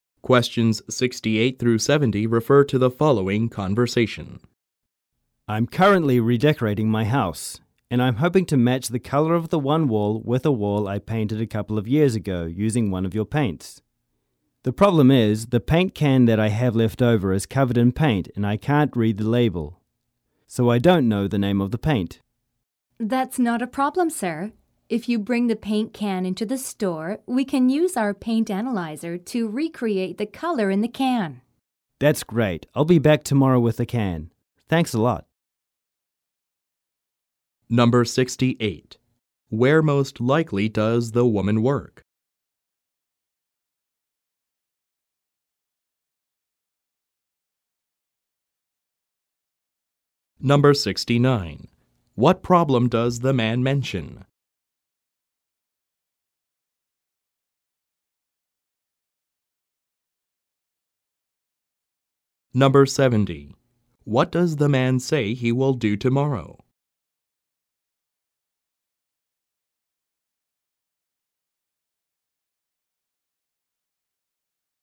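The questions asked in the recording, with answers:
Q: Where most likely does the woman work?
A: At a paint store

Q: What problem does the man mention?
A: He can't read the label on his paint can

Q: What does the man say he will do tomorrow?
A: Bring the paint can to the store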